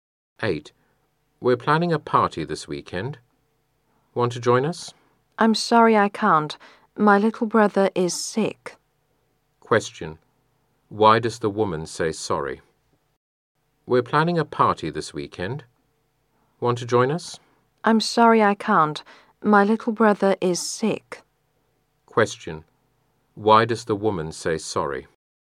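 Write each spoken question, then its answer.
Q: Why does the woman say sorry?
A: She can't join the party because her little brother is sick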